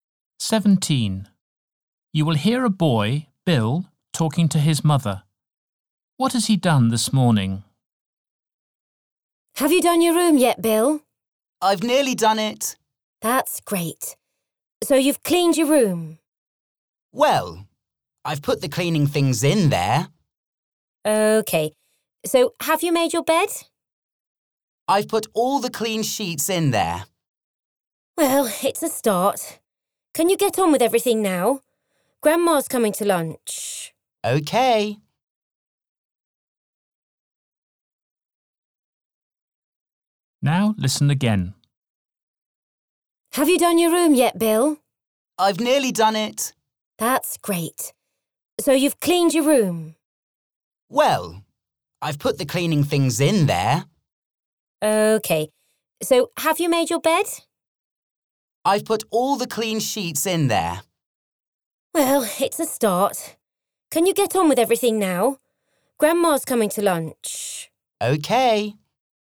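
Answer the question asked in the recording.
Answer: Put the cleaning things and clean sheets in his room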